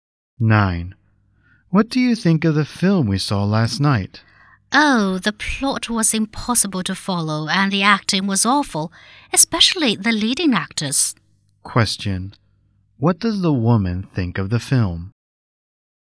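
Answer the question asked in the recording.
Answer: It was terrible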